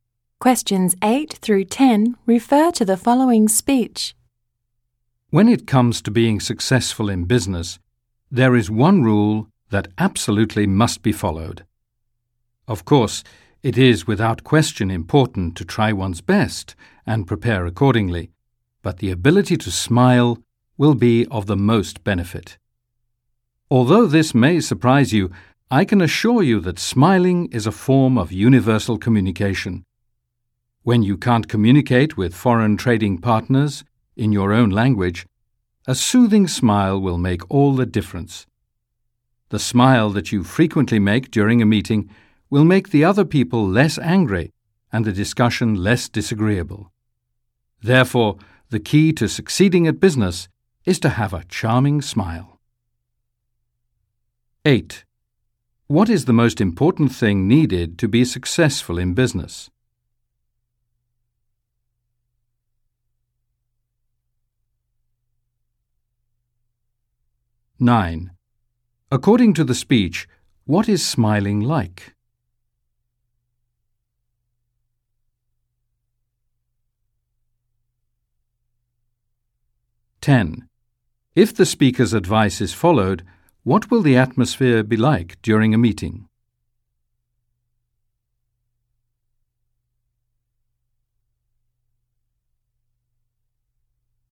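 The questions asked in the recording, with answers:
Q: What is the most important thing needed to be successful in business?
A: The ability to smile

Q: According to the speech, what is smiling like?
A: A form of universal communication

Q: If the speaker's advice is followed, what will the atmosphere be like during a meeting?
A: People will be less angry and the discussion less disagreeable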